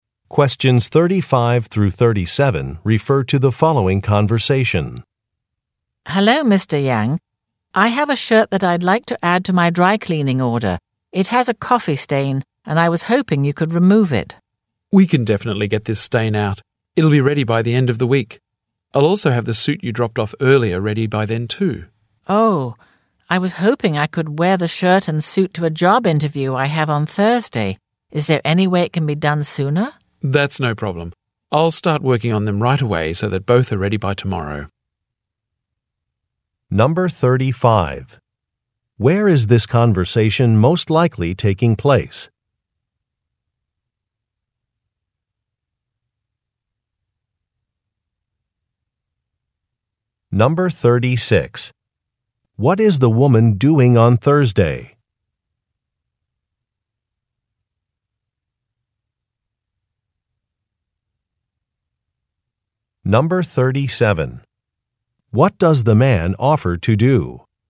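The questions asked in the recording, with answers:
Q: Where is this conversation most likely taking place?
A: At a dry cleaner

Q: What is the woman doing on Thursday?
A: Attending a job interview

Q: What does the man offer to do?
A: Have the shirt and suit ready by tomorrow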